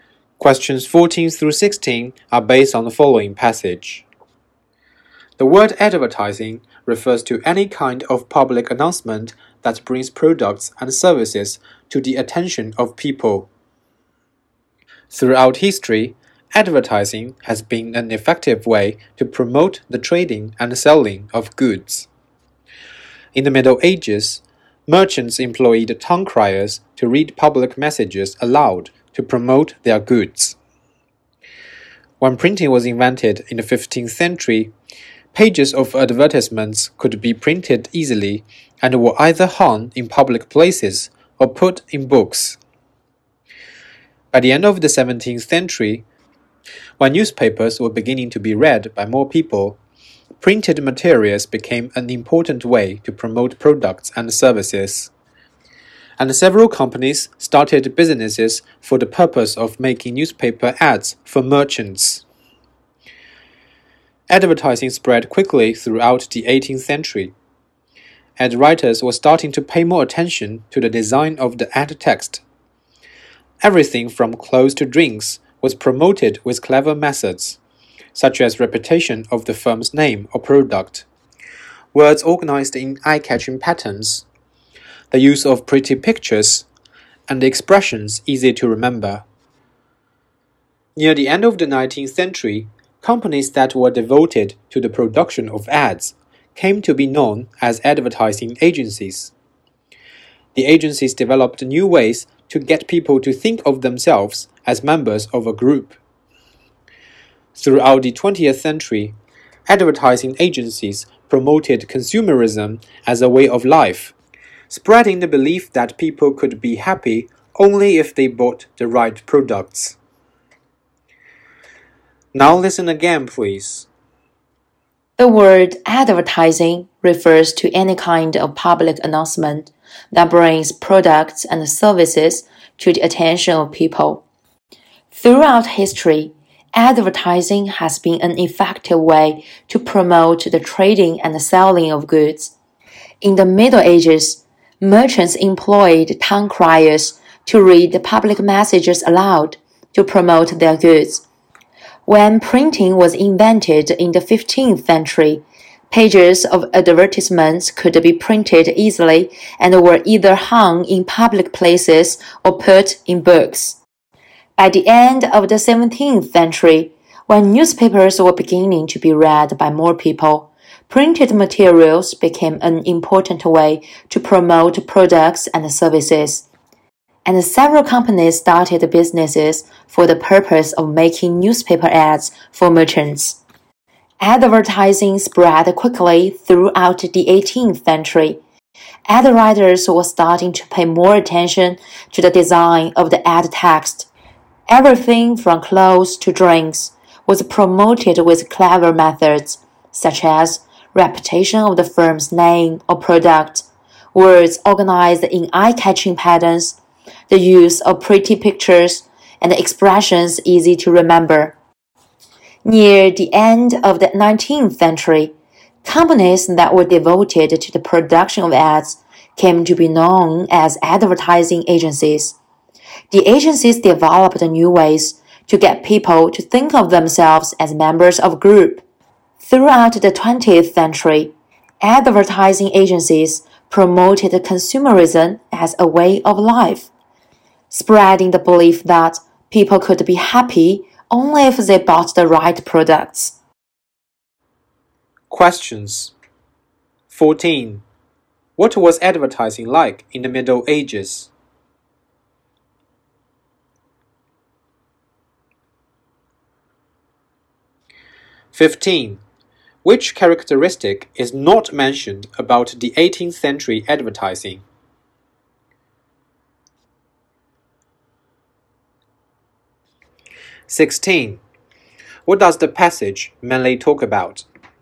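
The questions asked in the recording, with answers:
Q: What was advertising like in the Middle Ages?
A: Town criers read messages aloud to promote goods

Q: What does the passage mainly talk about?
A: The history of advertising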